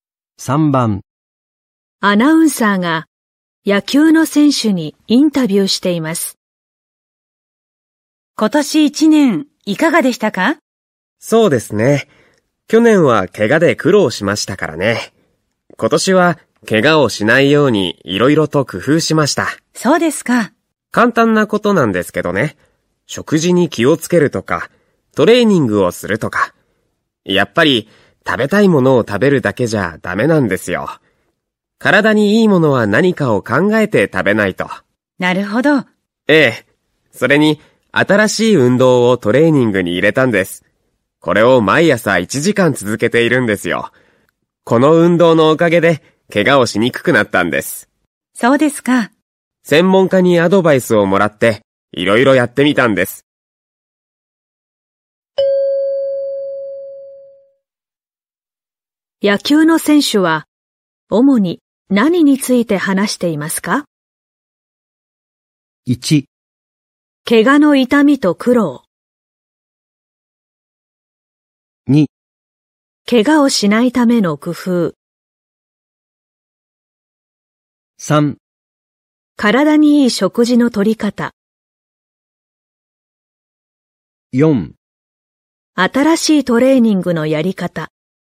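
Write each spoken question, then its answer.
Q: 野球の選手は主に何について話していますか?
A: 2: 怪我をしないための工夫。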